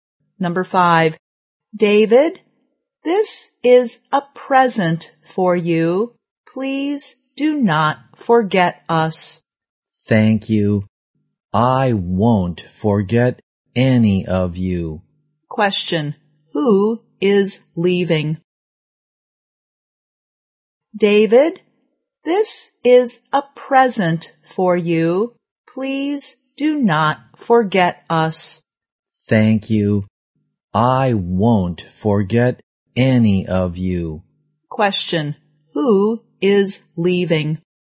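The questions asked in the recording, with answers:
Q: who is leaving?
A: David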